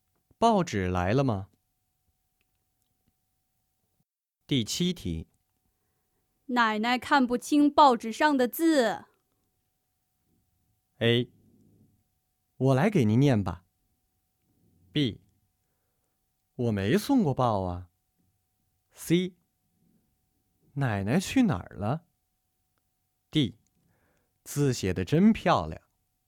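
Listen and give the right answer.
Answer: A: 我来给您念吧。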